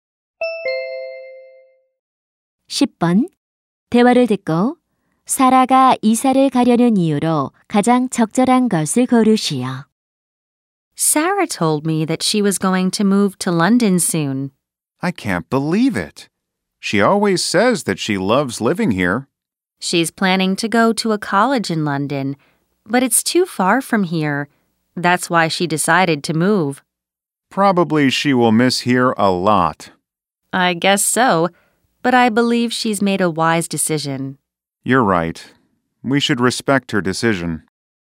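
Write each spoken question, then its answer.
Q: 대화를 듣고 사라가 이사를 가려는 이유로 가장 적절한 것을 고르시오.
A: 런던에 있는 대학에 다니기 위해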